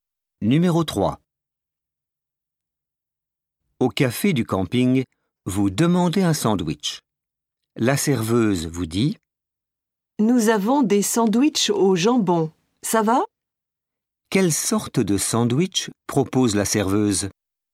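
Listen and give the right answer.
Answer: Au jambon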